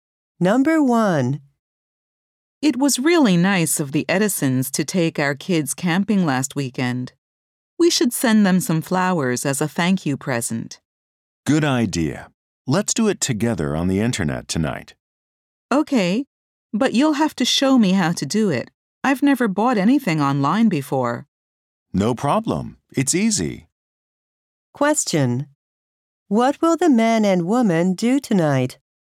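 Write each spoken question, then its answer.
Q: What will the man and woman do tonight?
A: Order flowers online for the Edisons as a thank-you present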